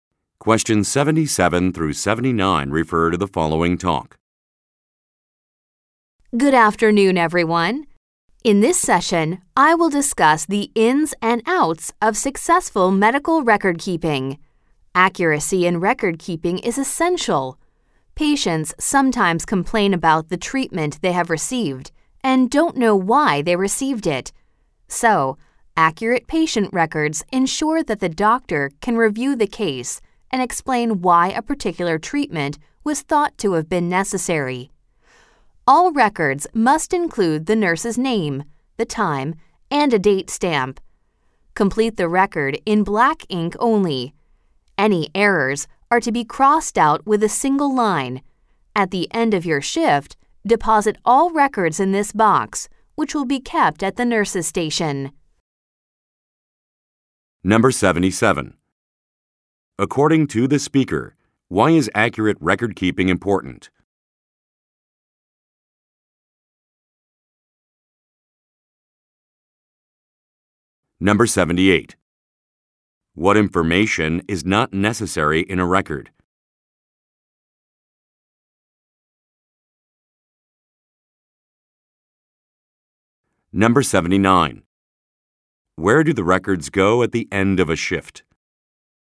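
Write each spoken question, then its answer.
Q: According to the speaker, why is accurate record keeping important?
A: So the doctor can review the case and explain why a treatment was necessary

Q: Where do the records go at the end of a shift?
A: In a box kept at the nurse's station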